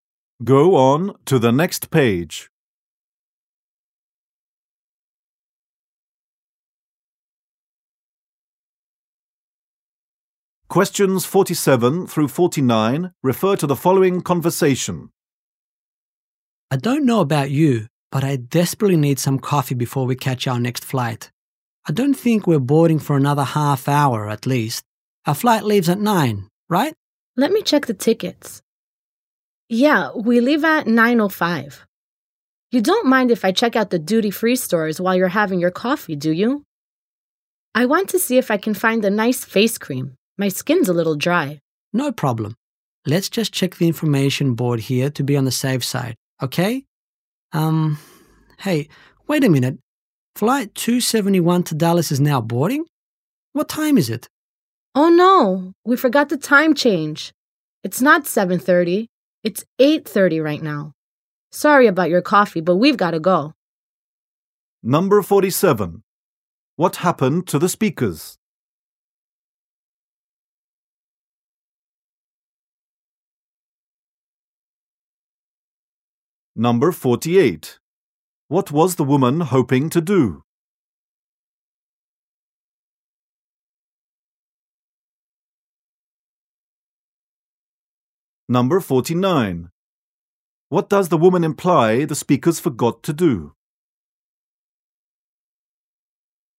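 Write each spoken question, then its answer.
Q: What was the woman hoping to do?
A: Shop the duty-free stores for a face cream

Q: What does the woman imply the speakers forgot to do?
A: Adjust for the time change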